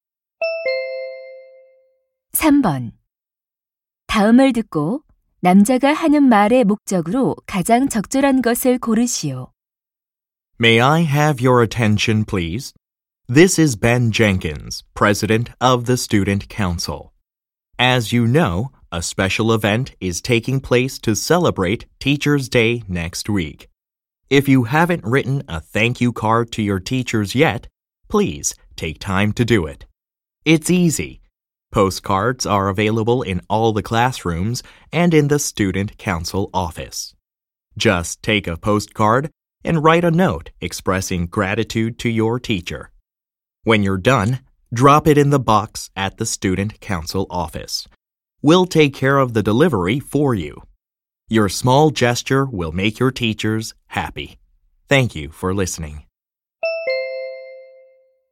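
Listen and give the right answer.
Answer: 스승의 날 감사 카드를 써서 학생회실 상자에 넣도록 독려하려고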